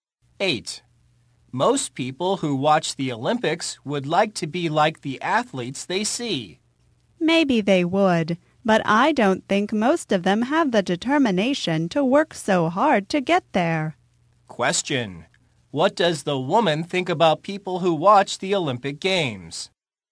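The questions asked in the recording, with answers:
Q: What does the woman think about people who watch the Olympic Games?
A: Most lack the determination to work so hard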